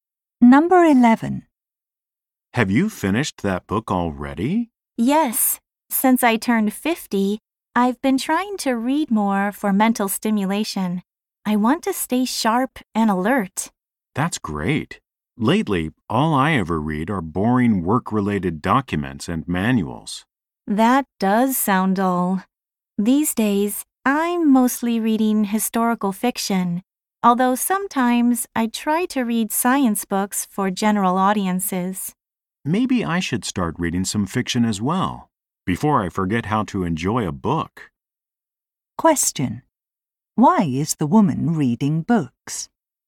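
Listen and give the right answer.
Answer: To stay mentally sharp and alert.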